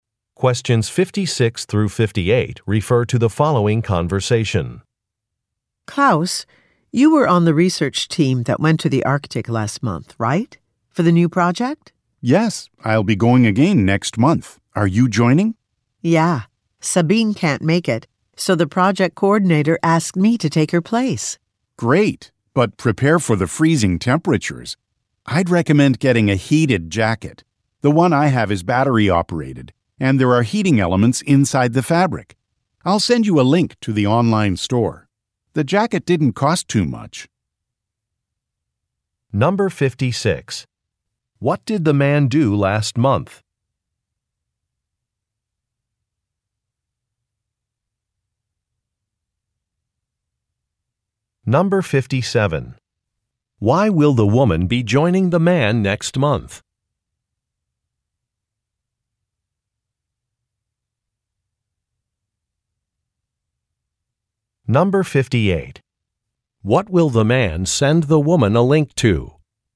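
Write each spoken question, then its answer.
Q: What did the man do last month?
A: He went on a research trip to the Arctic.

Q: Why will the woman be joining the man next month?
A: To take a colleague's (Sabine's) place, since she can't go.

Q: What will the man send the woman a link to?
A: An online store selling heated jackets.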